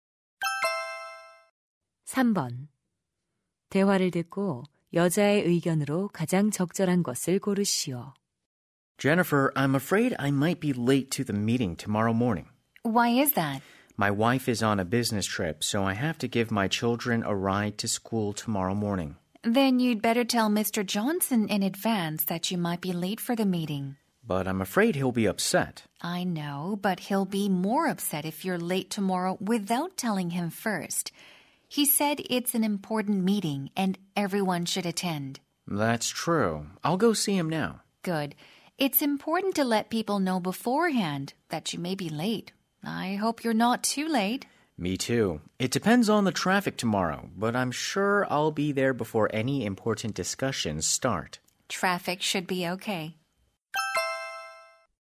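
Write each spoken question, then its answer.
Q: 대화를 듣고 여자의 의견으로 가장 적절한 것을 고르시오.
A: 늦을 수 있으면 미리 알려야 한다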